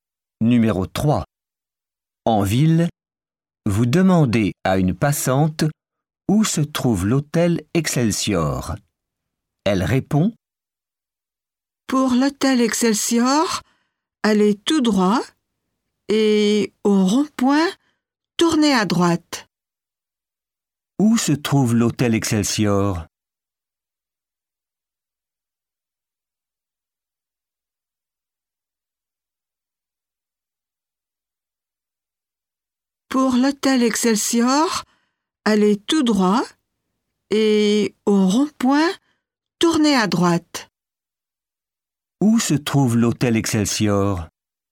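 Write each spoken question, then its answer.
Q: Où se trouve l'hôtel Excelsior ?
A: Tout droit, puis à droite au rond-point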